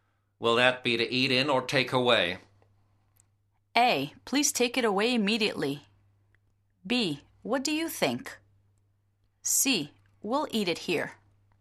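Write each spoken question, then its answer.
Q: Will that be to eat in or take away?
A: C: We'll eat it here.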